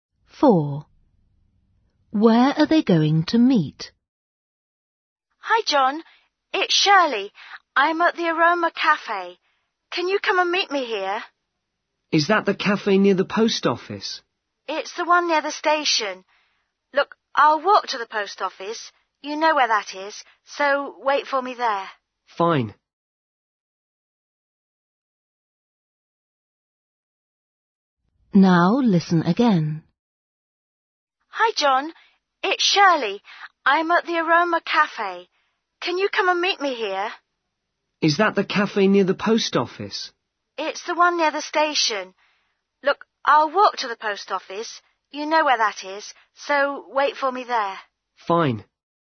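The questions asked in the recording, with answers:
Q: Where are they going to meet?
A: at the post office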